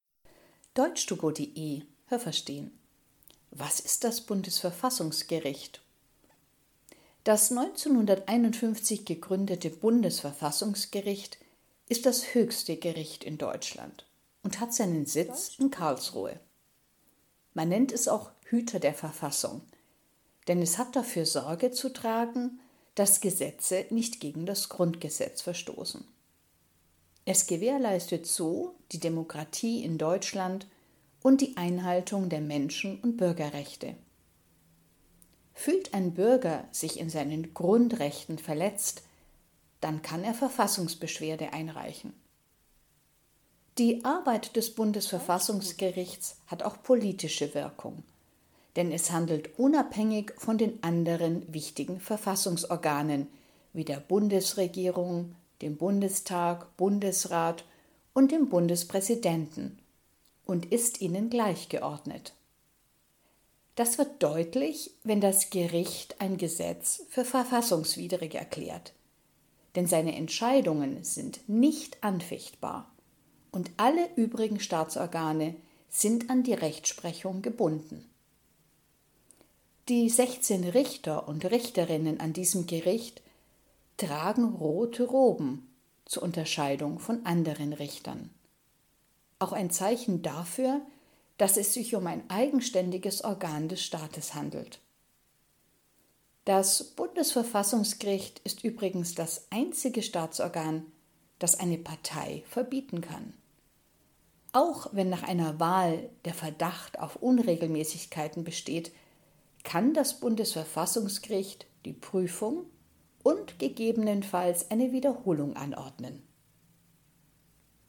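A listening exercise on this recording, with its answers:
Welches Verb passt?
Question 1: Das Bundesverfassungsgericht hat dafür Sorge zu _____ , dass Gesetze nicht gegen das Grundgesetz verstoßen.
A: tragen

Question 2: Jeder, der sich in seinen Grundrechten verletzt _____ , kann sich an das Bundesverfassungsgericht wenden.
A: fühlt

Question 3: Man kann Verfassungsbeschwerde _____ .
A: einreichen

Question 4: Das Bundesverfassungsgericht kann ein Gesetz für verfassungswidrig _____ .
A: erklären

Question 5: Das Bundesverfassungsgericht kann die Wiederholung einer Wahl _____ .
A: anordnen

Haben Sie das gehört? Stimmt diese Aussage?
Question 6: Das Bundesverfassungsgericht wurde 1915 gegründet und ist in Karlsruhe.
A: falsch

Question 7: Das Bundesverfassungsgericht wacht über die Einhaltung des Grundgesetzes für die Bundesrepublik Deutschland.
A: richtig

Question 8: Das Bundesverfassungsgericht arbeitet eng mit der Bundesregierung zusammen.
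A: falsch

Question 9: Die Bundesregierung, der Bundestag, der Bundesrat und der Bundespräsident stehen über dem Bundesverfassungsgericht.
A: falsch

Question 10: Das Bundesverfassungsgericht hat bei allen Streitigkeiten über die Verfassung das letzte Wort.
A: richtig

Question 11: Die Richter und Richterinnen am Bundesverfassungsgericht unterscheiden sich in ihrer Kleidung von ihren Kollegen und Kolleginnen an anderen Gerichten.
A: richtig

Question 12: Parteienverbote fallen in den alleinigen Zuständigkeitsbereich des Bundesverfassungsgerichts.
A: richtig

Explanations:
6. Es wurde 1951 gegründet.
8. Es handelt absolut unabhängig.
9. Alle diese Staatsorgane sind gleichgeordnet.

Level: C (schwer)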